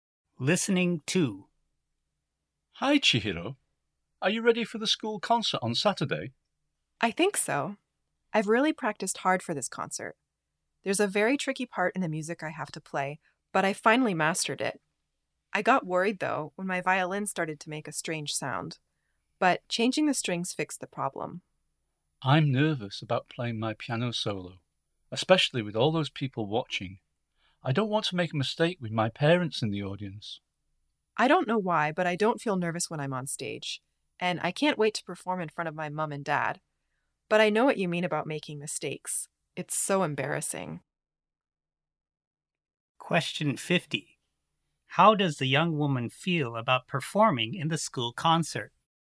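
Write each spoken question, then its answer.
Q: How does the young woman feel about performing in the school concert?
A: She is not nervous and is looking forward to it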